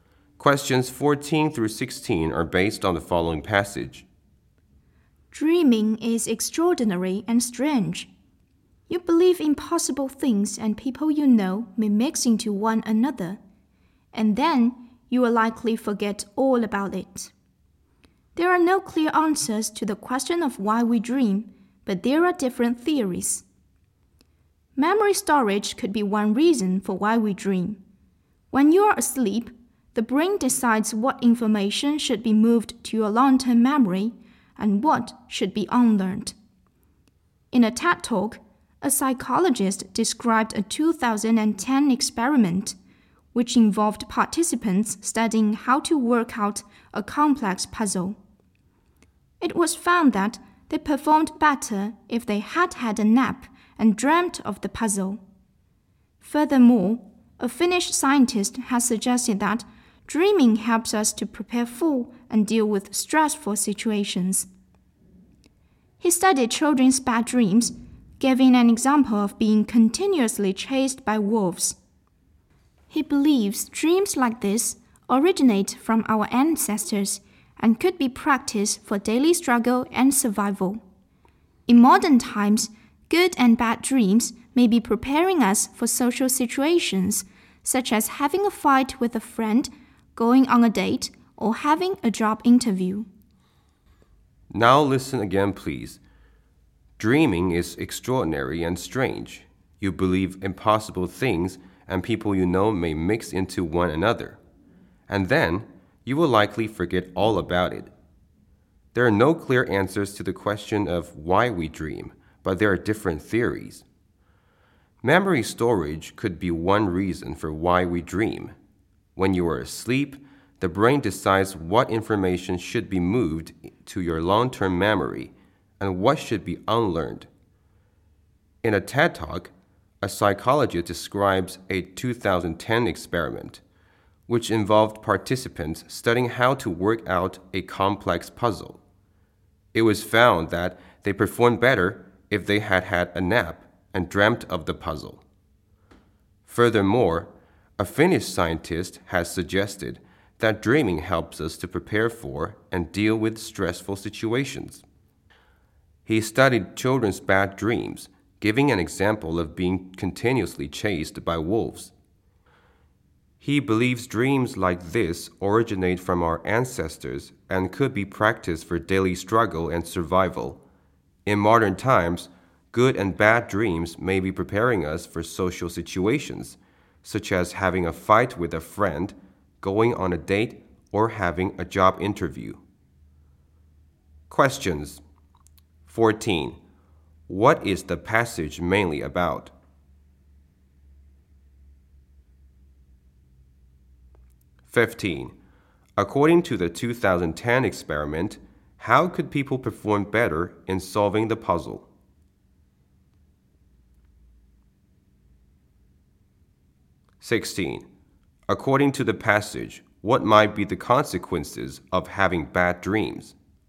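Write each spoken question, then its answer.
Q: What is the passage mainly about?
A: Theories about why we dream

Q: According to the 2010 experiment, how could people perform better in solving the puzzle?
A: By taking a nap and dreaming of the puzzle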